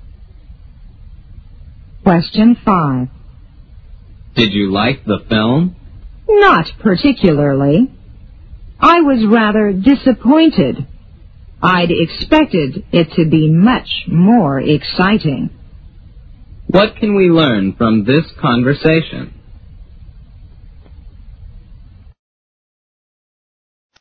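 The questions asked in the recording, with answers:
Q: What can we learn from this conversation?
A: The speaker did not like the film; it was less exciting than expected.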